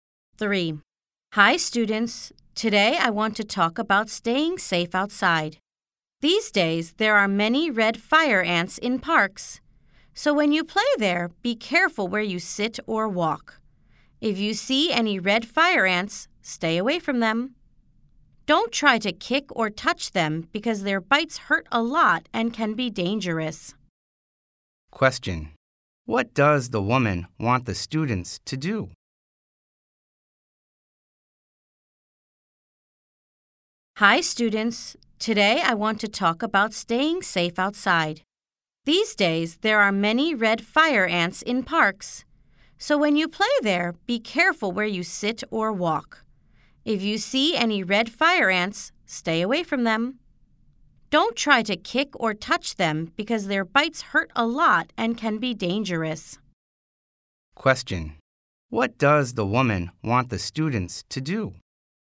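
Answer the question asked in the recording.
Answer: Be careful in parks and stay away from red fire ants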